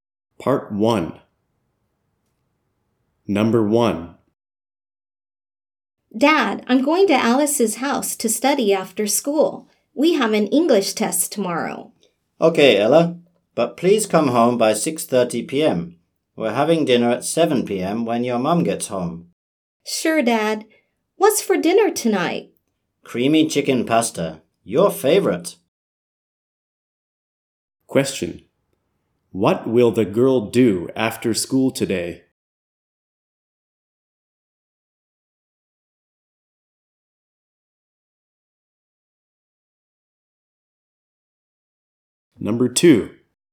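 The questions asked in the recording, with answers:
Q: What will the girl do after school today?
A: Go to Alice's house to study for an English test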